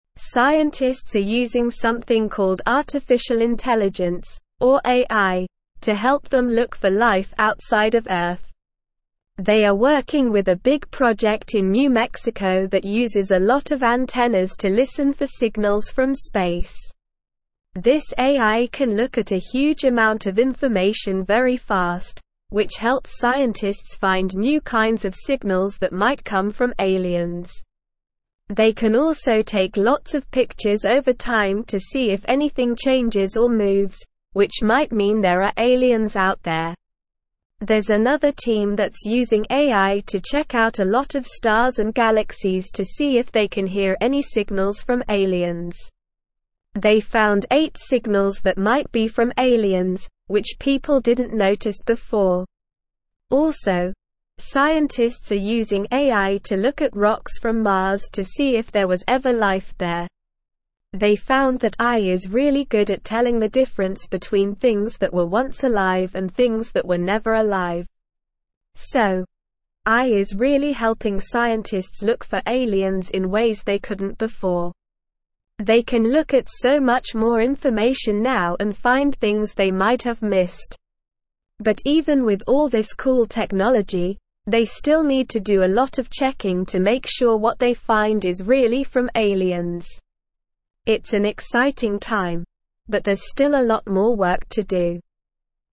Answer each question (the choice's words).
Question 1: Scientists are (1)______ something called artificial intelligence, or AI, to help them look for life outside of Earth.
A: using

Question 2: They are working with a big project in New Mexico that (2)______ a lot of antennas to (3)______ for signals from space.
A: uses

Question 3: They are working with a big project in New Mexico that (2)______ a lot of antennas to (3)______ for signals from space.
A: listen

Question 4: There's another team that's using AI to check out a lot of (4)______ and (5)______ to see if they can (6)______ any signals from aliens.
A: stars

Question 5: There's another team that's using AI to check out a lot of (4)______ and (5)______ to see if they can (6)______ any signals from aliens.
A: galaxies

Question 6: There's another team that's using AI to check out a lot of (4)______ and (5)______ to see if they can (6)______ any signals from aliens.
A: hear

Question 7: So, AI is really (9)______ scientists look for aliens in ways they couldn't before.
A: helping

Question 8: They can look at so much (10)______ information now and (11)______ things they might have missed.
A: more

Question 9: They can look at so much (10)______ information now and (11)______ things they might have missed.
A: find

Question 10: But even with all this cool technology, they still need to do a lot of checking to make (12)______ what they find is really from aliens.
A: sure

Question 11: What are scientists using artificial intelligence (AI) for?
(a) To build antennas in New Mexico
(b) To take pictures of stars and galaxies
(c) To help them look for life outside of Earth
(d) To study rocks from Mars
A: To help them look for life outside of Earth

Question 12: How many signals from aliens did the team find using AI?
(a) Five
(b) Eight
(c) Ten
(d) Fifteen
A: Eight

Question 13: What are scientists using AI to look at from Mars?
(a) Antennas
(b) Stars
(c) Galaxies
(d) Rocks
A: Rocks

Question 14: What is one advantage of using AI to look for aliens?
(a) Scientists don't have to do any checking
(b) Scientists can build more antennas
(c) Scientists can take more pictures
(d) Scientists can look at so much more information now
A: Scientists can look at so much more information now

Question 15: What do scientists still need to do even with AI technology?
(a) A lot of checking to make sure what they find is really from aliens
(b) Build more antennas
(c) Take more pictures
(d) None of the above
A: A lot of checking to make sure what they find is really from aliens

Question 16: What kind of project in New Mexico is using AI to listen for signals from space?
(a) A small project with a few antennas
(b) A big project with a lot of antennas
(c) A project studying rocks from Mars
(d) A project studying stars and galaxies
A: A big project with a lot of antennas

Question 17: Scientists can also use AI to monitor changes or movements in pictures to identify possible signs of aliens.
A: True

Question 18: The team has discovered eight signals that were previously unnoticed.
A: True

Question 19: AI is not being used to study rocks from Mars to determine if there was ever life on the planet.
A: False

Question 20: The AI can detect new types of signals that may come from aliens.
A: True

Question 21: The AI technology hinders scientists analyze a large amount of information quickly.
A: False

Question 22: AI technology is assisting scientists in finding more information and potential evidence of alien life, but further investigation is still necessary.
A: True

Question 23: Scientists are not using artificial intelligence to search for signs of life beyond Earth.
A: False

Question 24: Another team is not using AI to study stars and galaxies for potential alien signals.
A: False

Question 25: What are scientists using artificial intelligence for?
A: Scientists are using artificial intelligence to help them look for life outside of Earth.

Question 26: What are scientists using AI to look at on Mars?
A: Scientists are using AI to look at rocks from Mars to see if there was ever life there.

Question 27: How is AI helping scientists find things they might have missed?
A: AI is helping scientists find things they might have missed by looking at a lot more information and taking lots of pictures over time.

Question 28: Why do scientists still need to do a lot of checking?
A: Scientists still need to do a lot of checking to make sure what they find is really from aliens.

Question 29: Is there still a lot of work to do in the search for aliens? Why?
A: Yes, there is still a lot of work to do in the search for aliens because even with AI, scientists need to be sure that what they find is really from aliens.

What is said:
Scientists are using something called artificial intelligence, or AI, to help them look for life outside of Earth. They are working with a big project in New Mexico that uses a lot of antennas to listen for signals from space. This AI can look at a huge amount of information very fast, which helps scientists find new kinds of signals that might come from aliens. They can also take lots of pictures over time to see if anything changes or moves, which might mean there are aliens out there.
There's another team that's using AI to check out a lot of stars and galaxies to see if they can hear any signals from aliens. They found eight signals that might be from aliens, which people didn't notice before. Also, scientists are using AI to look at rocks from Mars to see if there was ever life there. They found that AI is really good at telling the difference between things that were once alive and things that were never alive.
So, AI is really helping scientists look for aliens in ways they couldn't before. They can look at so much more information now and find things they might have missed. But even with all this cool technology, they still need to do a lot of checking to make sure what they find is really from aliens. It's an exciting time, but there's still a lot more work to do.

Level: Level 2